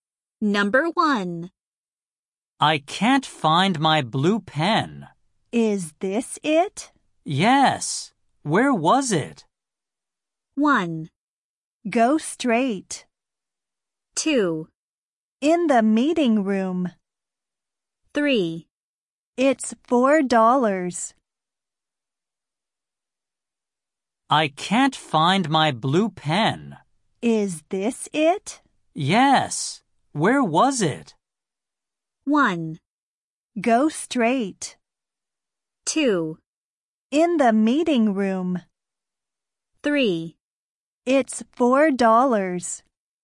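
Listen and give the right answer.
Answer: 2: In the meeting room.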